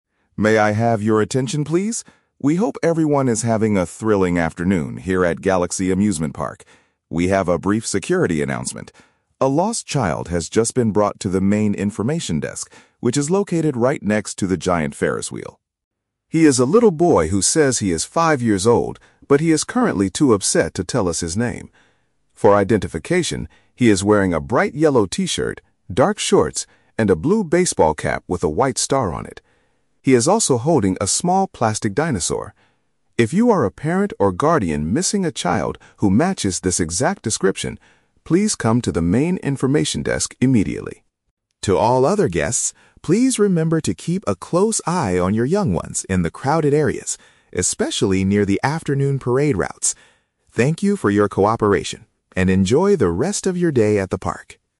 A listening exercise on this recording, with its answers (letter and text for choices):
Listen to an announcement over a loudspeaker at an amusement park and choose the correct answer (A, B, or C) for each question.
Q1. What is the main purpose of this announcement?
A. To inform visitors about a broken ride.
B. To reunite a separated family.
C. To announce the start of a daily parade.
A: B. To reunite a separated family.

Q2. What is the current condition of the little boy?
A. He is happily playing with a new dinosaur toy.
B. He is crying because he dropped his blue hat.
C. He is too distressed to provide his personal details.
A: C. He is too distressed to provide his personal details.

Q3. What advice does the speaker give to the rest of the park visitors?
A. Supervise their children carefully in busy zones.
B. Avoid walking near the large Ferris wheel.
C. Go to the information desk to get a free map.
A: A. Supervise their children carefully in busy zones.

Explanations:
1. The announcer says a "lost child" has been found and asks the parent or guardian "missing a child" to come to the desk. Option (B) uses paraphrasing ("reunite a separated family" = finding the parents of a lost child). Option (A) is plausible for a park announcement, but no broken ride is mentioned. Option (C) is a trap; the "parade" is mentioned at the end, but it is not the main reason for the announcement.
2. The speaker says the boy is "too upset to tell us his name." Option (C) perfectly paraphrases this ("distressed" = upset, "personal details" = his name). Option (A) is a trap; a "dinosaur" is mentioned, but he is holding it while being upset, not playing happily. Option (B) is a trap; he is wearing the "blue hat," he didn't drop it.
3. The announcer tells other guests to "keep a close eye on your young ones in the crowded areas." Option (A) uses synonyms to express this advice ("supervise" = keep a close eye on, "children" = young ones, "busy zones" = crowded areas). Option (B) is a trap; the "Ferris wheel" is where the desk is located, not an area they need to avoid. Option (C) is not mentioned in the audio.

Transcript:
Announcer: May I have your attention, please. We hope everyone is having a thrilling afternoon here at Galaxy Amusement Park. We have a brief security announcement. A lost child has just been brought to the main information desk, which is located right next to the giant Ferris wheel.
He is a little boy who says he is five years old, but he is currently too upset to tell us his name. For identification, he is wearing a bright yellow t-shirt, dark shorts, and a blue baseball cap with a white star on it. He is also holding a small plastic dinosaur. If you are a parent or guardian missing a child who matches this exact description, please come to the main information desk immediately.
To all other guests, please remember to keep a close eye on your young ones in the crowded areas, especially near the afternoon parade routes. Thank you for your cooperation, and enjoy the rest of your day at the park.